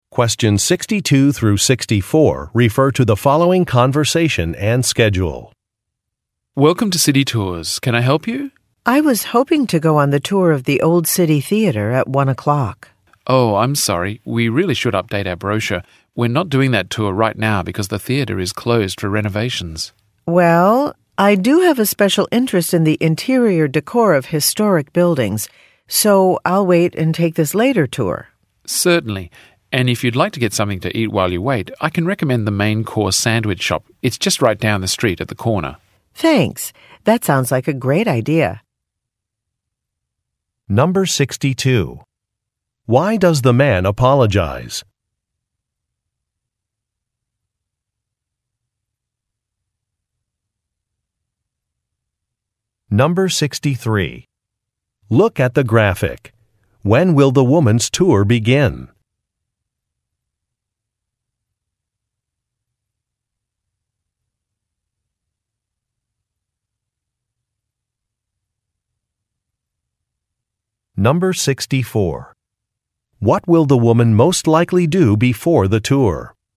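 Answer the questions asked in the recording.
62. A tour is not available because the theater is closed for renovations (the brochure is out of date).
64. Get something to eat at a sandwich shop.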